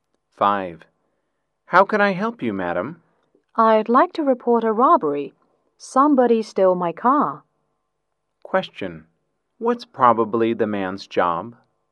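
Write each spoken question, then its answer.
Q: What's probably the man's job?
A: A policeman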